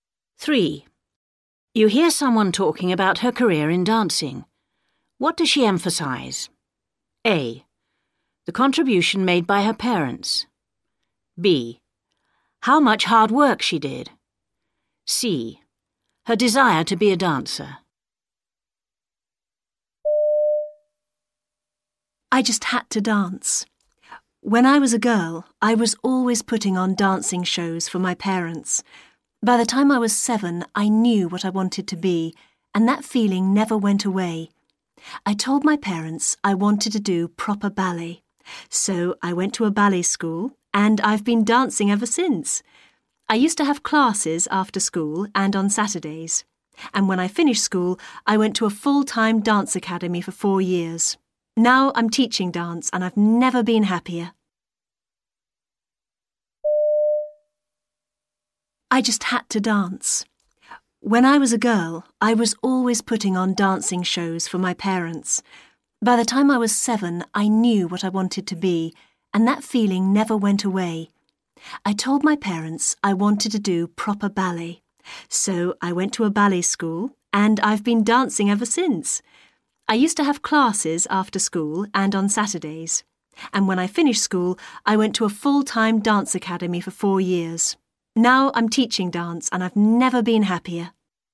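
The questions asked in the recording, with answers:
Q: What does she emphasise?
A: C: Her desire to be a dancer.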